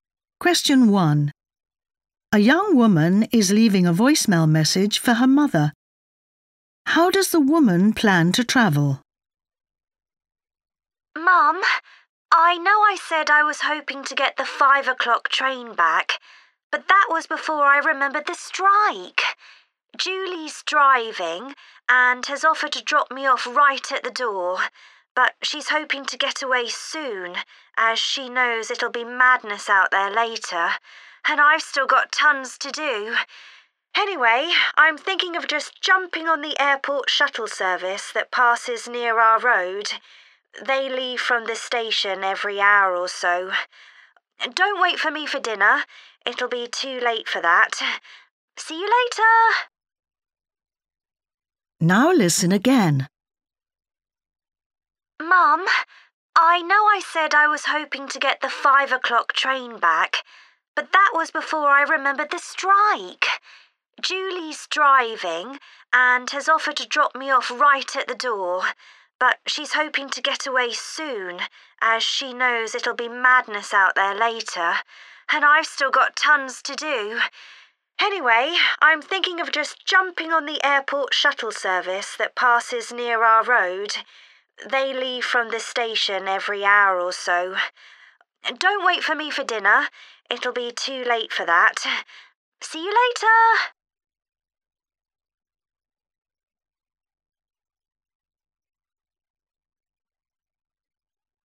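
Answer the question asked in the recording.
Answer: By the airport shuttle bus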